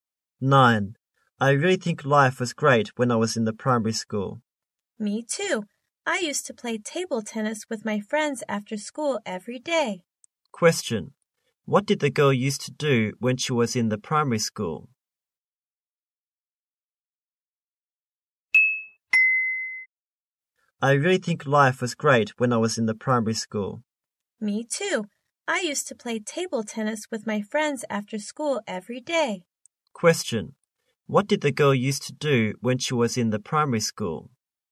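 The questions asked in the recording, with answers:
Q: What did the girl used to do when she was in the primary school?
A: Play table tennis with her friends after school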